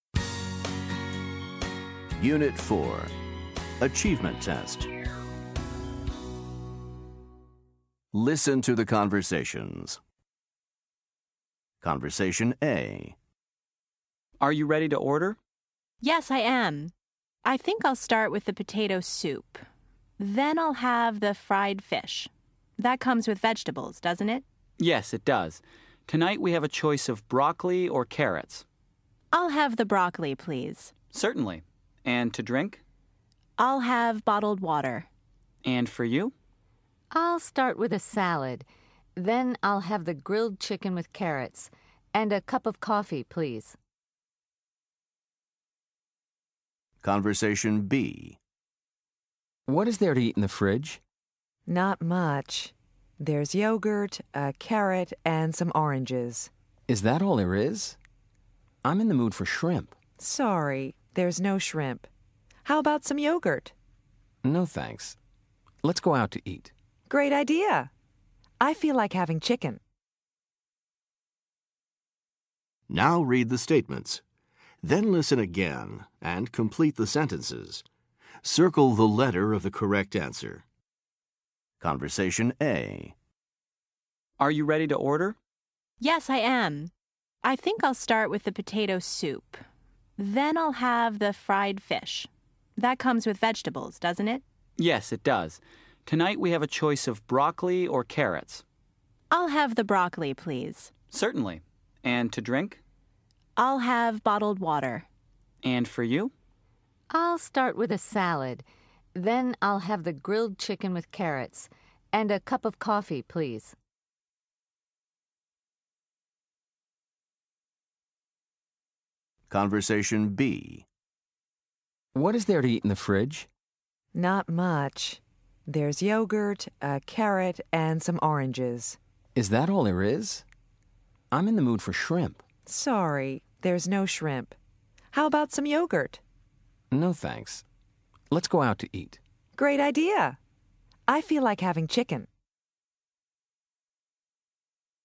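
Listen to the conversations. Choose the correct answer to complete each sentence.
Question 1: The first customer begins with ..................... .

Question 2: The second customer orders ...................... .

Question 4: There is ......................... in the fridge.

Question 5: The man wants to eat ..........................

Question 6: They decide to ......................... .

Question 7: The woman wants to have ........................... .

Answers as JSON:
{"1": "potato soup", "2": "grilled chicken with carrots", "4": "yogurt", "5": "shrimp", "6": "go out to eat", "7": "chicken"}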